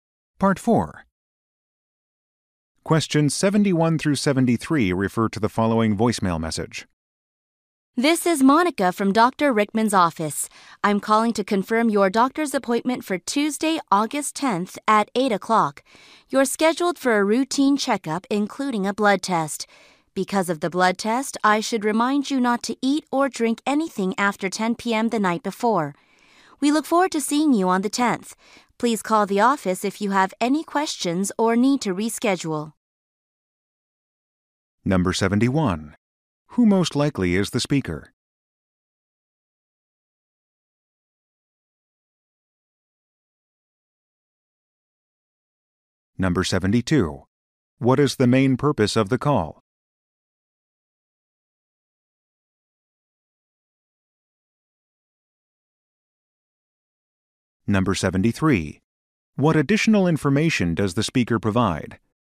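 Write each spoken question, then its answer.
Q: Who most likely is the speaker?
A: A receptionist at Dr. Rickman's office

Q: What is the main purpose of the call?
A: To confirm a doctor's appointment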